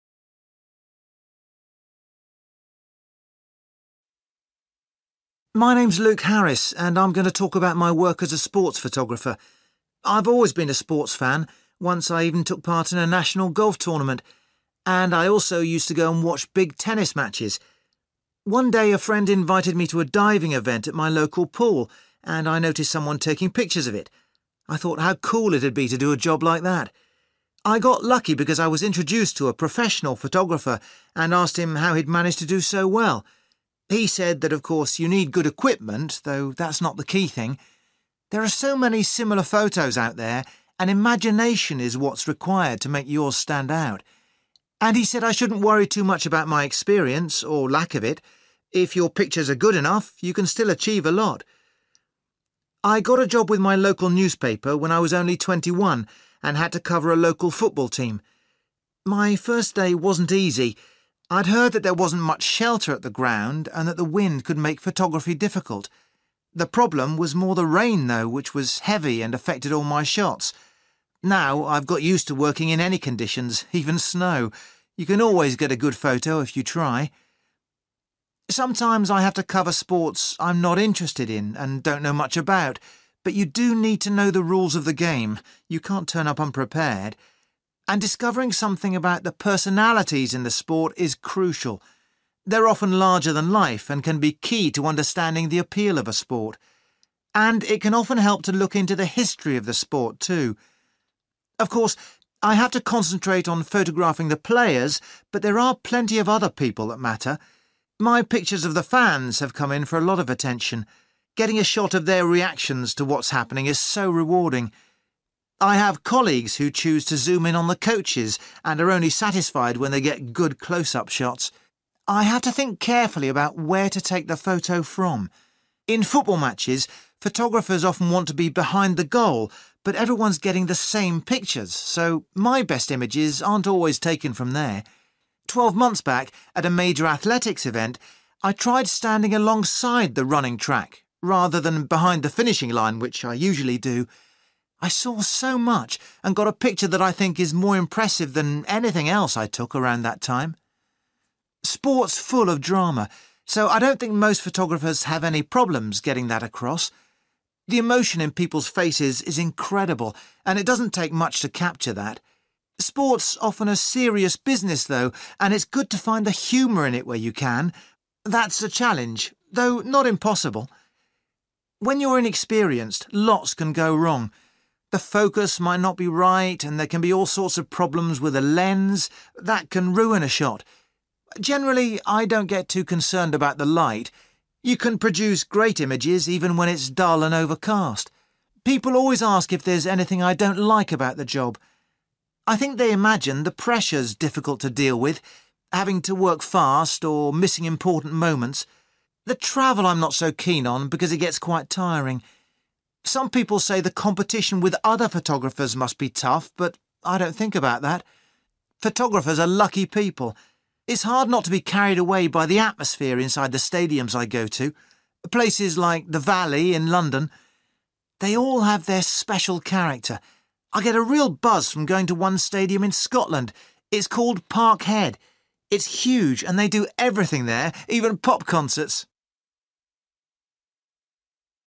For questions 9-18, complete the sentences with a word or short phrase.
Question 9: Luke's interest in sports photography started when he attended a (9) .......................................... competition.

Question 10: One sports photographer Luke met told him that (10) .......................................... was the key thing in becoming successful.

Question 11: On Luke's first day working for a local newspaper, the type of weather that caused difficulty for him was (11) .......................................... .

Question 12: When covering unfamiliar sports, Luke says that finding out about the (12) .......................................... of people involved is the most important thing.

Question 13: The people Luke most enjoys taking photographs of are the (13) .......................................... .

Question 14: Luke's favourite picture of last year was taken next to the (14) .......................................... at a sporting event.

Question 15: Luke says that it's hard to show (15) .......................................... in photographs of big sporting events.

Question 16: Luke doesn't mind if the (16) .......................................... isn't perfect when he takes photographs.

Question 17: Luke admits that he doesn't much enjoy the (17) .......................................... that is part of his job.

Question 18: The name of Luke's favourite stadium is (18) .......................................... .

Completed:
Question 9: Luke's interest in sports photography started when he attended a diving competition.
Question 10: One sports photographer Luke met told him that imagination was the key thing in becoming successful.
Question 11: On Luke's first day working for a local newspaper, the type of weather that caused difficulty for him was (heave) rain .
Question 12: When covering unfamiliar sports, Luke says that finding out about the personality/personalities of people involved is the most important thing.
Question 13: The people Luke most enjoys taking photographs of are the fans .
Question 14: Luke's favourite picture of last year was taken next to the (running) track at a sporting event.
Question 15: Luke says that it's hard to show (the) humour/humor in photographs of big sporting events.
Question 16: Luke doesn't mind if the light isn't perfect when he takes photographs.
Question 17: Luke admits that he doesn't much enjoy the travel/traveling/travelling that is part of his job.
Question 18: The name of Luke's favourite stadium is Parkhead / Park Head (Stadium) (in Scotland) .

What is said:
Luke: My name's Luke Harris and I'm going to talk about my work as a sports photographer. I've always been a sports fan – once I even took part in a national golf tournament. And I also used to go and watch big tennis matches. One day, a friend invited me to a diving event at my local pool and I noticed someone taking pictures of it. I thought how cool it'd be to do a job like that.
I got lucky because I was introduced to a professional photographer and asked him how he'd managed to do so well. He said that, of course, you need good equipment, though that's not the key thing. There are so many similar photos out there and imagination is what's required to make yours stand out. And he said I shouldn't worry too much about my experience or lack of it. If your pictures are good enough, you can still achieve a lot.
I got a job with my local newspaper when I was only twenty-one and had to cover a local football team. My first day wasn't easy. I'd heard that there wasn't much shelter at the ground and that the wind could make photography difficult. The problem was more the rain, though, which was heavy and affected all my shots. Now, I've got used to working in any conditions, even snow. You can always get a good photo if you try.
Sometimes I have to cover sports I'm not interested in and don't know much about, but you do need to know the rules of the game – you can't turn up unprepared. And discovering something about the personalities in the sport is crucial. They're often larger than life and can be key to understanding the appeal of a sport. And it can often help to look into the history of the sport too.
Of course, I have to concentrate on photographing the players, but there are plenty of other people that matter. My pictures of the fans have come in for a lot of attention. Getting a shot of their reactions to what's happening is so rewarding. I have colleagues who choose to zoom in on the coaches and are only satisfied when they get good close-up shots.
I have to think carefully about where to take the photo from. In football matches, photographers often want to be behind the goal, but everyone's getting the same pictures, so my best images aren't always taken from there. Twelve months back, at a major athletics event, I tried standing alongside the running track, rather than behind the finishing line, which I usually do. I saw so much, and got a picture that I think is more impressive than anything else I took around that time.
Sport's full of drama, so I don't think most photographers have any problems getting that across. The emotion in people's faces is incredible and it doesn't take much to capture that. Sport's often a serious business, though, and it's good to find the humour in it where you can – that's a challenge, though not impossible.
When you're inexperienced, lots can go wrong. The focus might not be right and there can be all sorts of problems with the lens. That can ruin a shot. Generally, I don't get too concerned about the light. You can produce great images, even when it's dull and overcast.
People always ask if there's anything I don't like about the job. I think they imagine the pressure's difficult to deal with: having to work fast or missing important moments. The travel I'm not so keen on because it gets quite tiring. Some people say the competition with other photographers must be tough, but I don't think about that.
Photographers are lucky people. It's hard not to be carried away by the atmosphere inside the stadiums I go to, places like The Valley in London. They all have their special character. I get a real buzz from going to one stadium in Scotland. It's called Parkhead. It's huge an they do everything there – even pop cencerts!